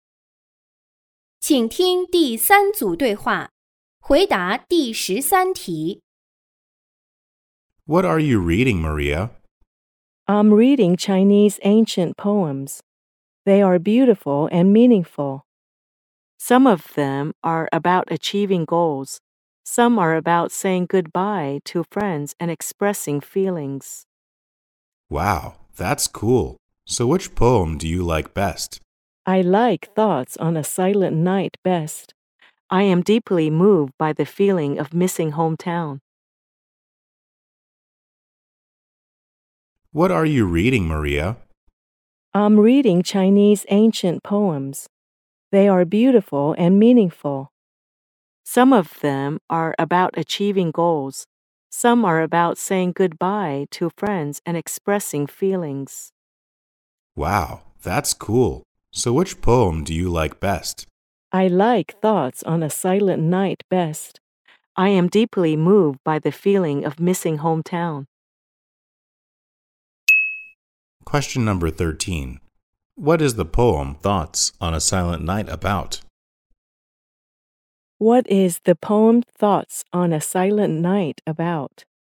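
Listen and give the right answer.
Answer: Missing hometown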